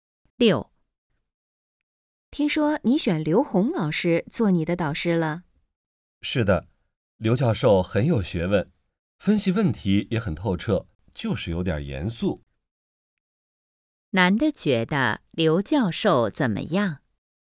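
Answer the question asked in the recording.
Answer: 很有学问,分析问题透彻,但有点严肃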